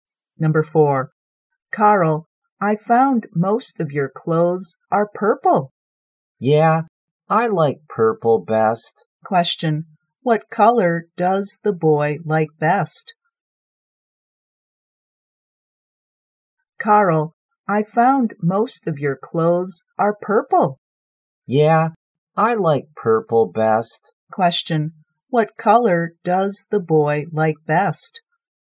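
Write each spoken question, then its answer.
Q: what color does the boy like best?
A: Purple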